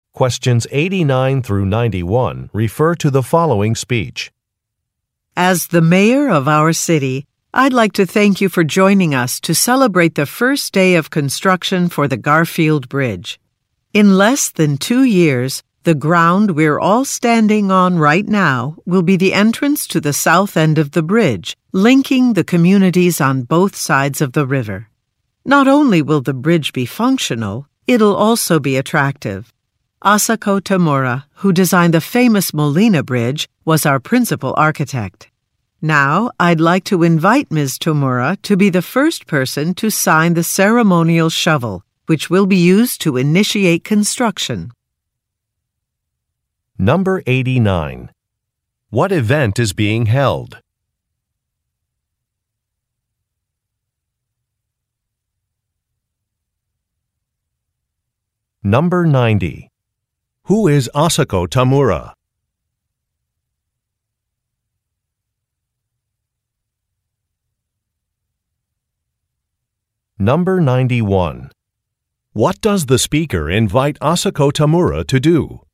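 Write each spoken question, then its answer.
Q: What event is being held?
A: A groundbreaking ceremony for the Garfield Bridge

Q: Who is Asako Tamura?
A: The bridge's principal architect

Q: What does the speaker invite Asako Tamura to do?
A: Sign the ceremonial shovel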